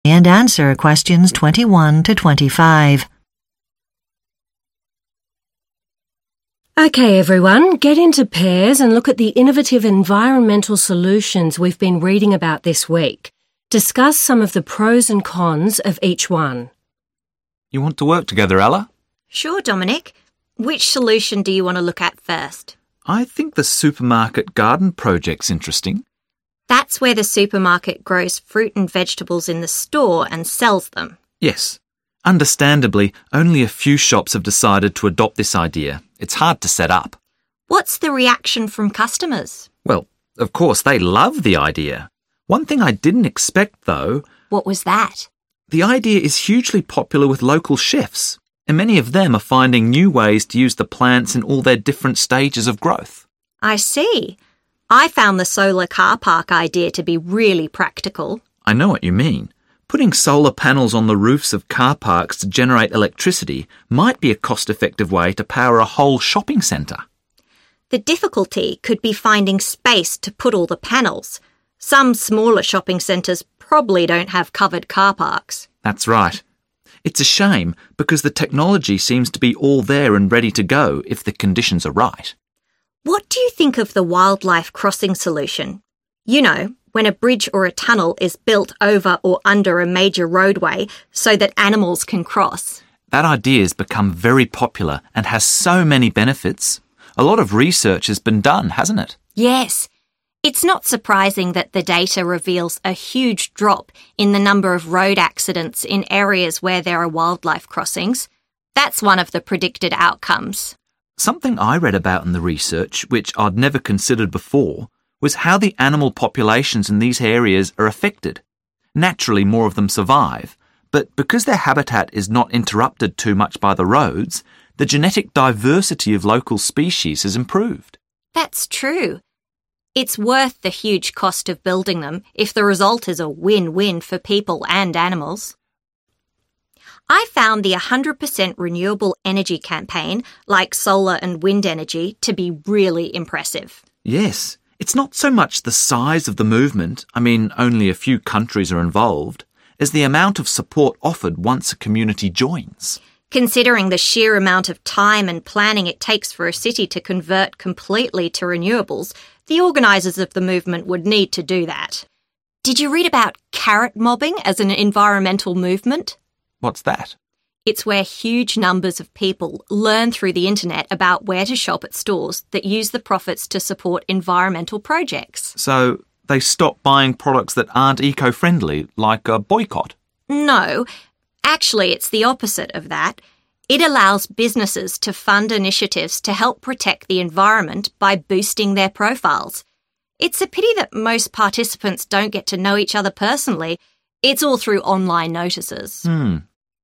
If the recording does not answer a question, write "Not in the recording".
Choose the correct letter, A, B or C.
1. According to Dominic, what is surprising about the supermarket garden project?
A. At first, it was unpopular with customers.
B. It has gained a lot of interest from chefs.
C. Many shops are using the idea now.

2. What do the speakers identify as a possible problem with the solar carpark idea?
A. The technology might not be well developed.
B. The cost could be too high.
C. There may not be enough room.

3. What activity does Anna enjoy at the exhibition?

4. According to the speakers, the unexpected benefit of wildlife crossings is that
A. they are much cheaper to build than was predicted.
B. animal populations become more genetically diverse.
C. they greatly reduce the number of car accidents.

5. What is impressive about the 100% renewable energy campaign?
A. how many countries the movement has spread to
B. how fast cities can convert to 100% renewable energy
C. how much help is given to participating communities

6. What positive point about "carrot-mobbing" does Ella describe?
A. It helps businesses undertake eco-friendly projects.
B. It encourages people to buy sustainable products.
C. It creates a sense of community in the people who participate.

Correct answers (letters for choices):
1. B
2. C
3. Not in the recording
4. B
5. C
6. A